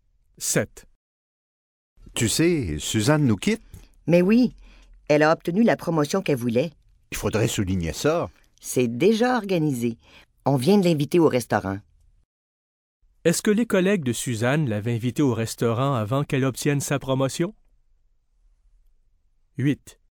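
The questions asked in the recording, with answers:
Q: Est-ce que les collègues de Suzanne l'avaient invitée au restaurant avant qu'elle obtienne sa promotion?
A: Non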